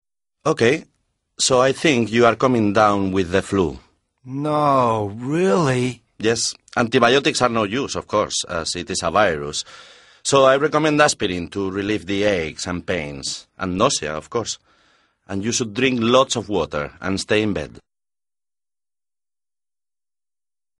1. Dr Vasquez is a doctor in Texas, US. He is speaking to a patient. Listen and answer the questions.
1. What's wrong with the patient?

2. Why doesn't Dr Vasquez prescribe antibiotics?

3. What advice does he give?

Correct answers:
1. He's coming down with the flu.
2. Because the flu is a virus, so antibiotics aren't any use.
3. Dr Vasquez advises the patient to take some aspirin (to relieve the aches and pains and nausea) and to drink lots of water and stay in bed.